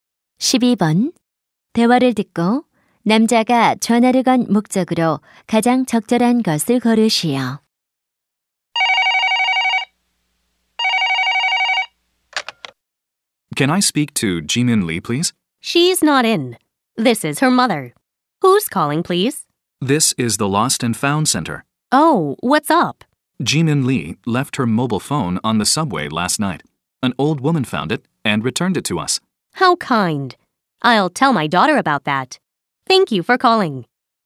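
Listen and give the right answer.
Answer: 분실한 휴대전화를 찾았다고 알리려고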